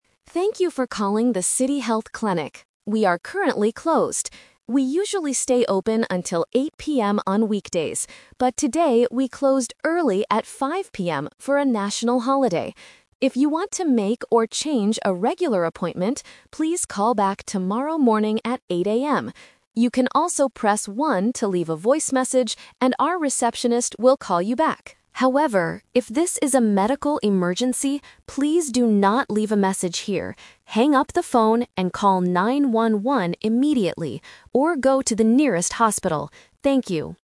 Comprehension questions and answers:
Listen to the recorded telephone message. Choose the correct answer (A, B, or C) for each question.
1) Why is the clinic closed right now?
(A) Because it is past 8:00 PM.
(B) Because it is a national holiday.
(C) Because it is the weekend.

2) What should a patient do to make a regular appointment?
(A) Press 1 to speak to a doctor.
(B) Go to the nearest hospital.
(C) Call the clinic again tomorrow.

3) What is the instruction for a medical emergency?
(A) Leave a voice message.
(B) Call 911 or go to a hospital.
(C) Wait on the line for a receptionist.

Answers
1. (B) Because it is a national holiday.
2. (C) Call the clinic again tomorrow.
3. (B) Call 911 or go to a hospital.

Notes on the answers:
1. The automated voice clearly states, "today we closed early at 5:00 PM for a national holiday." Trap A is wrong (The Twist): The clinic is usually open until 8:00 PM, but today is an exception. Trap C is wrong: The weekend is a plausible reason for a clinic to be closed, but it is not mentioned in the audio (the audio actually mentions "weekdays").
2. The message says, "If you want to make or change a regular appointment, please call back tomorrow morning." Trap A is wrong: Pressing 1 is to "leave a voice message," not to speak directly to a doctor. Trap B is wrong: Going to the hospital is for a medical emergency, not for a regular appointment.
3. For emergencies, the instruction is clear: "call 911 immediately, or go to the nearest hospital." Trap A is wrong (Instruction Trap): The voice specifically warns, "if this is a medical emergency, please do not leave a message here." Trap C is wrong: Waiting on the line is a common automated phone instruction, but it is not mentioned in this recording.

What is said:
Automated Voice: Thank you for calling the City Health Clinic. We are currently closed. We usually stay open until 8:00 PM on weekdays, but today we closed early at 5:00 PM for a national holiday.
If you want to make or change a regular appointment, please call back tomorrow morning at 8:00 AM. You can also press 1 to leave a voice message, and our receptionist will call you back. However, if this is a medical emergency, please do not leave a message here. Hang up the phone and call 911 immediately, or go to the nearest hospital. Thank you.

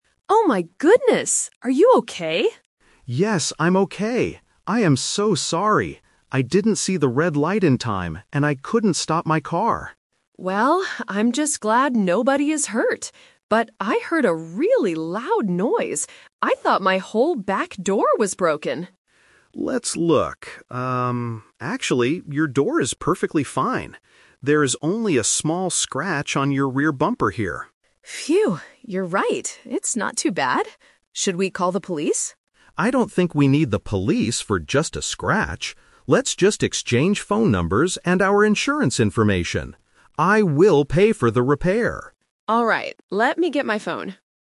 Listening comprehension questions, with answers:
Listen to the conversation and circle the correct answer (A, B, or C).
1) Why did the accident happen?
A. The man was driving too fast.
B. The man didn't stop for the red light in time.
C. The woman stopped her car suddenly.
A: B. The man didn't stop for the red light in time.

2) What part of the woman's car is actually damaged?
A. The back door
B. The rear bumper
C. The front window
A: B. The rear bumper

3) What do they decide to do next?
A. Call the police immediately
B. Drive to a repair shop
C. Give each other their information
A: C. Give each other their information

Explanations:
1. The man admits his fault by saying, "I didn't see the red light in time, and I couldn't stop my car." Options (A) and (C) are common reasons for accidents in real life, but they are not mentioned in the audio.
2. This question features "The Twist". The woman originally thought her back door was broken because of the noise (Option A - Trap). However, the man clarifies, "your door is perfectly fine. There is only a small scratch on your rear bumper." Option (C) is not mentioned.
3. The man suggests, "Let's just exchange phone numbers and our insurance information," and the woman agrees. Option (A) is a trap; the woman asks if they should call the police, but the man rejects the idea ("I don't think we need the police"). Option (B) is not mentioned as their immediate next step.

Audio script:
Woman (Driver 1): Oh my goodness! Are you okay?
Man (Driver 2): Yes, I'm okay. I am so sorry! I didn't see the red light in time, and I couldn't stop my car.
Woman: Well, I'm just glad nobody is hurt. But I heard a really loud noise. I thought my whole back door was broken!
Man: Let's look... Um, actually, your door is perfectly fine. There is only a small scratch on your rear bumper here.
Woman: Phew. You're right, it's not too bad. Should we call the police?
Man: I don't think we need the police for just a scratch. Let's just exchange phone numbers and our insurance information. I will pay for the repair.

